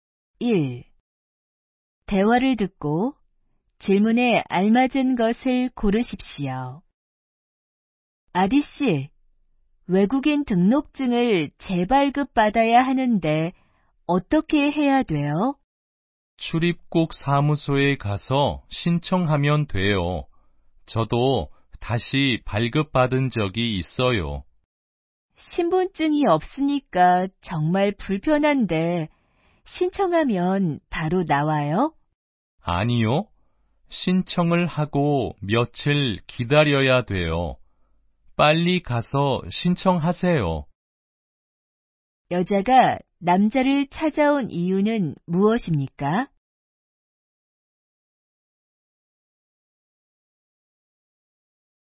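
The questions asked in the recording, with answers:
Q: 여자가 남자를 찾아온 이유는 무엇입니까?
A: 외국인 등록증 재발급 방법을 물어보려고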